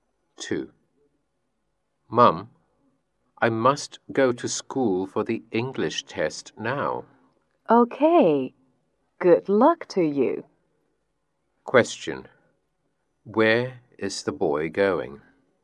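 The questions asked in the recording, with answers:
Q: Where is the boy going?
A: To school.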